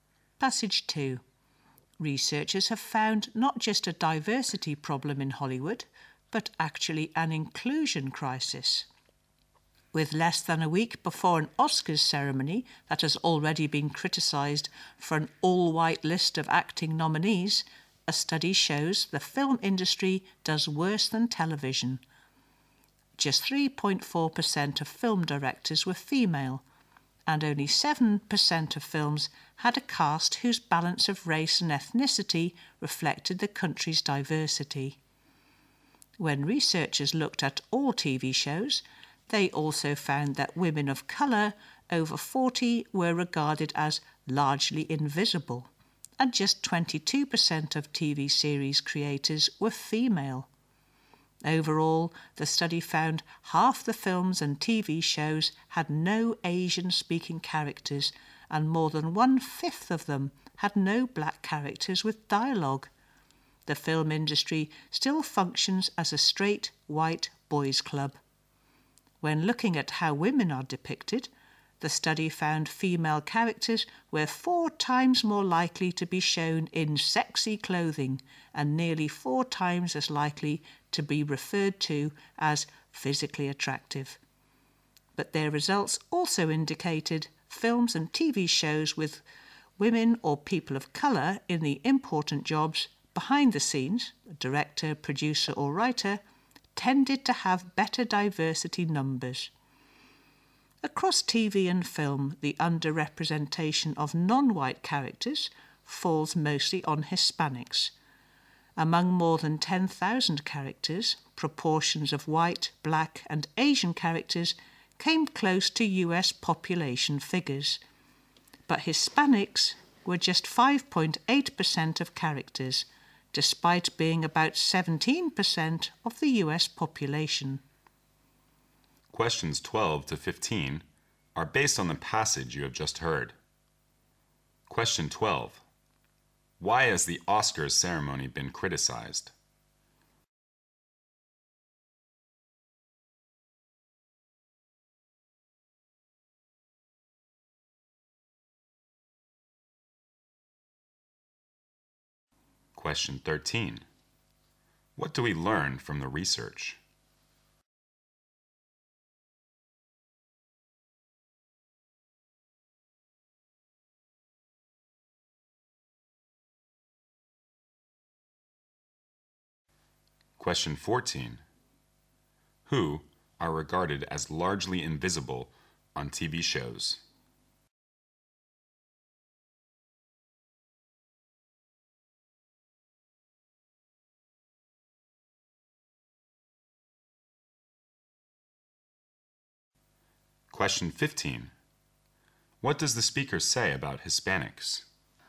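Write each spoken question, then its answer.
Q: Why has the Oscars ceremony been criticized?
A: All its acting nominees are white

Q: Who are regarded as largely invisible on TV shows?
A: Women of colour over 40

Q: What does the speaker say about Hispanics?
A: They are underrepresented: only 5.8% of characters but about 17% of the population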